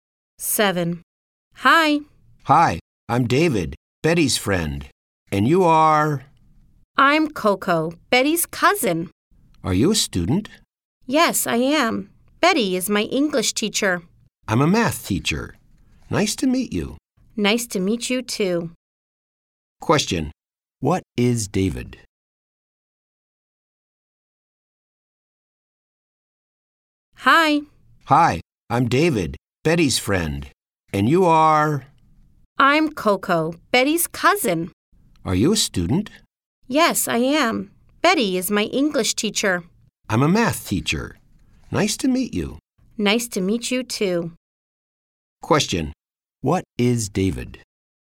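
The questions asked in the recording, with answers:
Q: What is David?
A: A math teacher.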